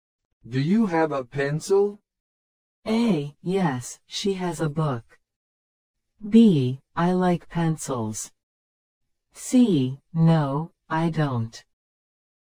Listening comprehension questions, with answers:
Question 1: Do you have a pencil?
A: No, I don't.

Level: 初級者用